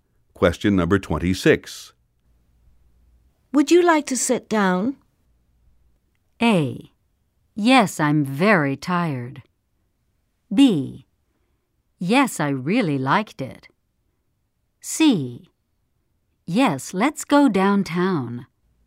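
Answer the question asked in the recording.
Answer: A: Yes, I'm very tired.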